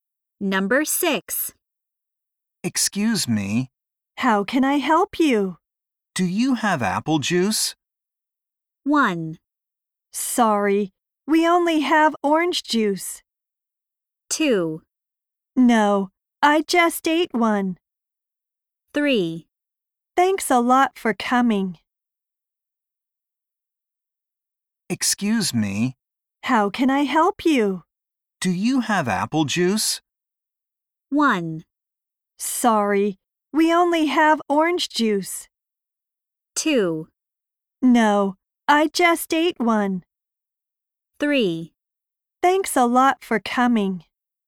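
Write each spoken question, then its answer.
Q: Do you have apple juice?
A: 1: Sorry, we only have orange juice.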